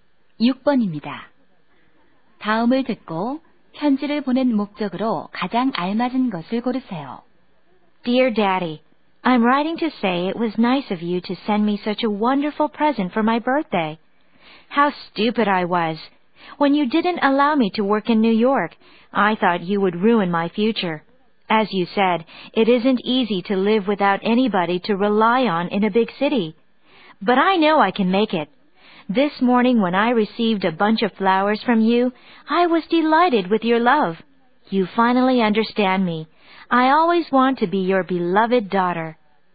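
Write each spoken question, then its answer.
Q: 다음을 듣고 편지를 보낸 목적으로 가장 알맞은 것을 고르세요.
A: 아버지의 생일 선물에 감사하기 위해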